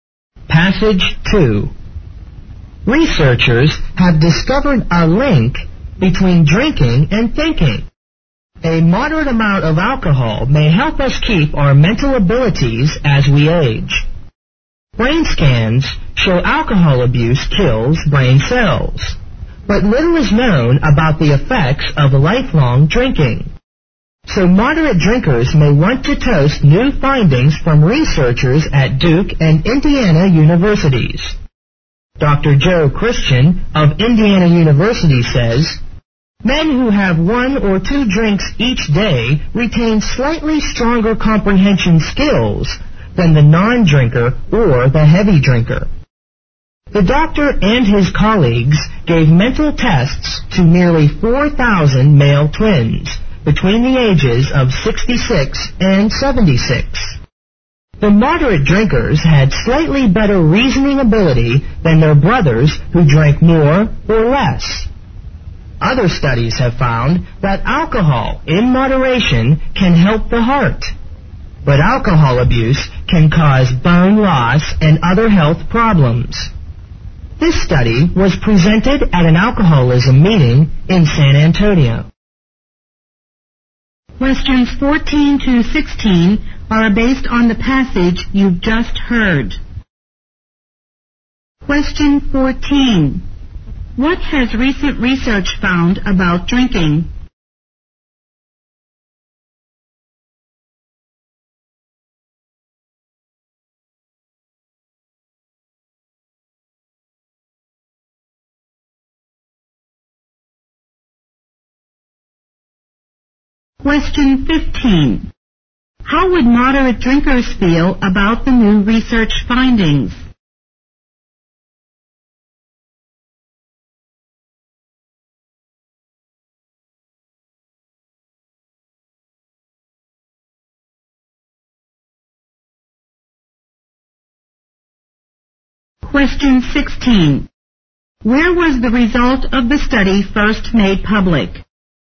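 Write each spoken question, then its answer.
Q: What has recent research found about drinking?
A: Moderate drinking may help people keep their mental abilities as they age

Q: Where was the result of the study first made public?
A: At an alcoholism meeting in San Antonio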